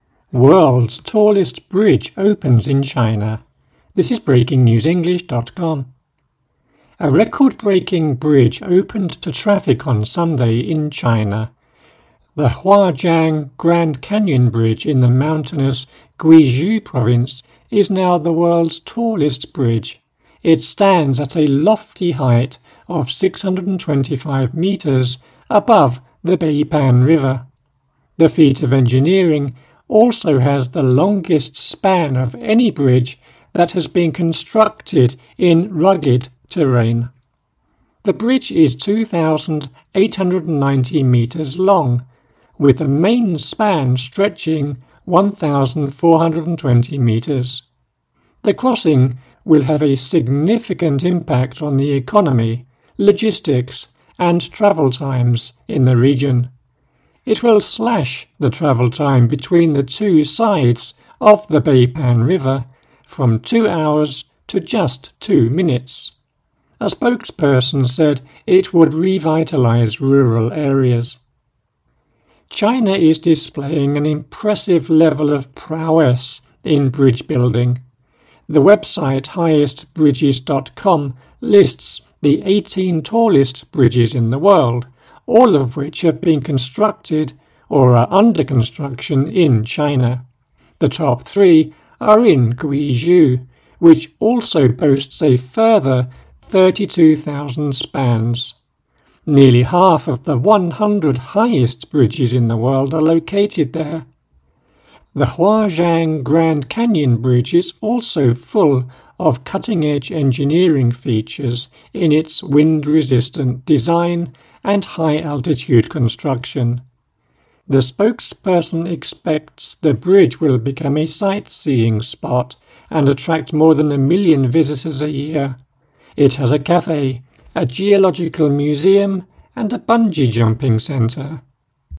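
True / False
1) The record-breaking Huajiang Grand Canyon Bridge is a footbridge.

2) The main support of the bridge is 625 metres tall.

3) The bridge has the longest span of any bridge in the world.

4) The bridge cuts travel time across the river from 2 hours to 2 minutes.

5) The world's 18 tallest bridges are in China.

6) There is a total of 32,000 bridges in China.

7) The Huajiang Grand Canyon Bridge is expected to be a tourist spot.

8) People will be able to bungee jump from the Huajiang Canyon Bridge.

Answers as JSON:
{"1": "F", "2": "F", "3": "F", "4": "T", "5": "T", "6": "F", "7": "T", "8": "T"}

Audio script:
World's tallest bridge opens in China
Huajiang Canyon Bridge1
A record-breaking bridge opened to traffic on Sunday in China. The Huajiang Grand Canyon Bridge in mountainous Guizhou Province is now the world's tallest bridge. It stands at a lofty height of 625 metres above the Beipan River. 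The feat of engineering also has the longest span of any bridge that has been constructed in rugged terrain. The bridge is 2,890 metres long, with the main span stretching 1,420 metres. The crossing will have a significant impact on the economy, logistics, and travel times in the region. It will slash the travel time between the two sides of the Beipan River from two hours to just two minutes. A spokesperson said it would revitalize rural areas.
China is displaying an impressive level of prowess in bridge-building. The website highestbridges.com lists the 18 tallest bridges in the world, all of which have been constructed or are under construction in China. The top three are in Guizhou, which also boasts a further 32,000 spans. Nearly half of the 100 highest bridges in the world are located there. The Huajiang Grand Canyon Bridge is also full of cutting-edge engineering features in its wind-resistant design and high-altitude construction. 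The spokesperson expects the bridge will become a sightseeing spot and attract more than a million visitors a year. It has a cafe, a geological museum, and a bungee-jumping centre.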